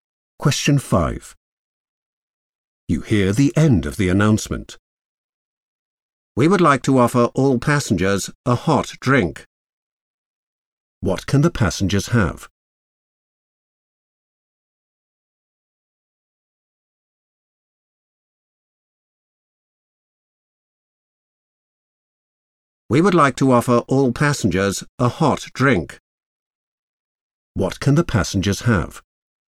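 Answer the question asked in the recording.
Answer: a hot drink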